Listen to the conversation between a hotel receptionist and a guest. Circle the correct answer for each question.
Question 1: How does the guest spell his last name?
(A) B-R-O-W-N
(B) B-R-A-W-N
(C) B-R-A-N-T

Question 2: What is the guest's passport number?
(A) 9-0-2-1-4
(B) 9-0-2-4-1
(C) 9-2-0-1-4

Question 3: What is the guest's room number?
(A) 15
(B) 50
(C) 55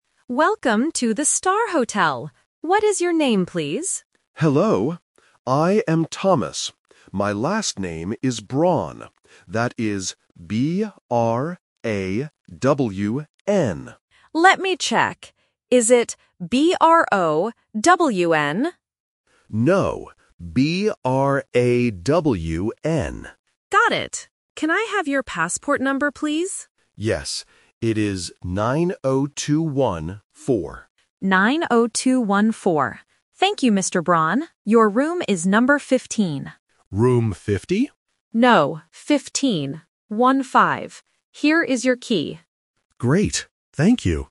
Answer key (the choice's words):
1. B-R-A-W-N
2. 9-0-2-1-4
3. 15

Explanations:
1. The guest spells his last name clearly as "B-R-A-W-N". Option (A) is the trap because the receptionist guesses "B-R-O-W-N", but the guest says "No". Option (C) is a plausible name but is never mentioned.
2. The guest reads his passport number as "9-0-2-1-4". Option (B) is a trap because it swaps the last two numbers (4-1 instead of 1-4) to confuse listeners. Option (C) is not mentioned.
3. The receptionist says the room is "number 15" and repeats "One-five". Option (B) 50 is the trap because the guest mishears and asks "Room 50?", which is a very common listening mistake for A1 learners (-teen vs -ty). Option (C) is not mentioned.